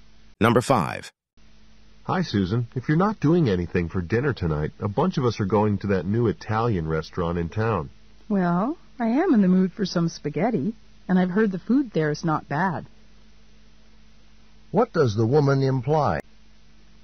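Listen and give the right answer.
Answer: She will go to dinner at the Italian restaurant.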